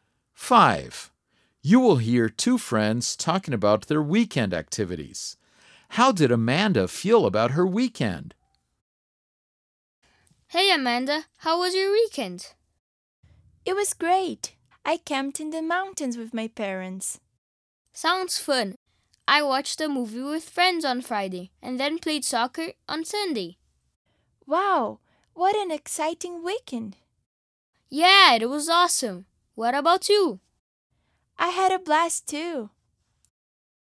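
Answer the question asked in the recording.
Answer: She thought it was great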